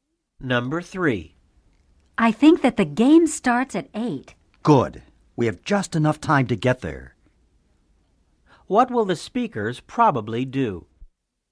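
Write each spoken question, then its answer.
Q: What will the speakers probably do?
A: They will go to the game.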